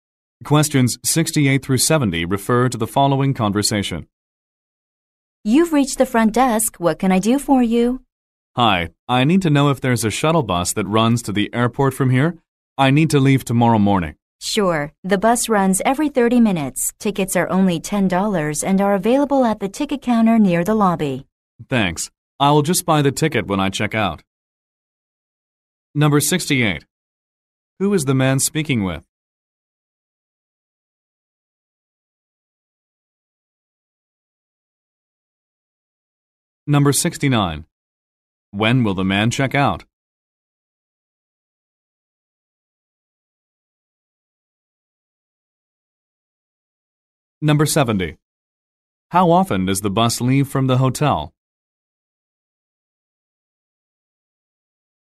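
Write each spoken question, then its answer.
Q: Who is the man speaking with?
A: A hotel front desk clerk

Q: When will the man check out?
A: Tomorrow morning

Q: How often does the bus leave from the hotel?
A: Every 30 minutes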